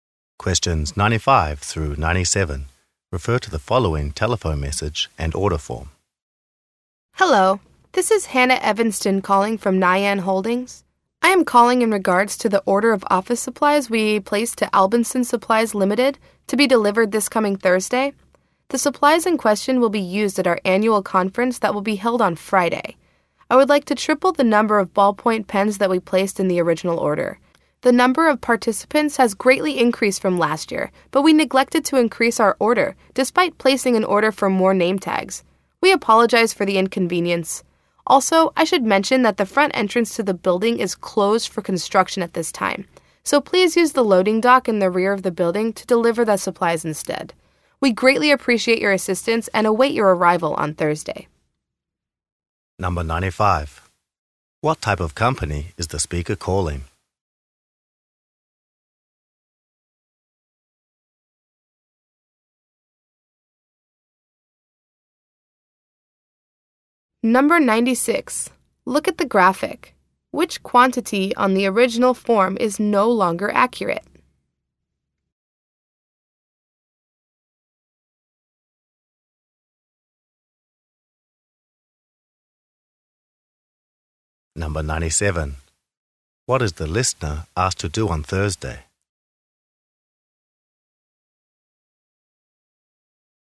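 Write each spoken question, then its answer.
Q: What type of company is the speaker calling?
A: An office supply company

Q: What is the listener asked to do on Thursday?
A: Deliver via the loading dock at the rear of the building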